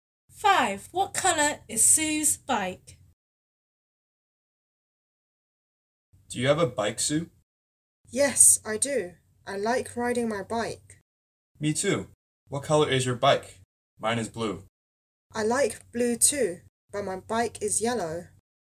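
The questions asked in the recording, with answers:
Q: What colour is Sue's bike?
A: blue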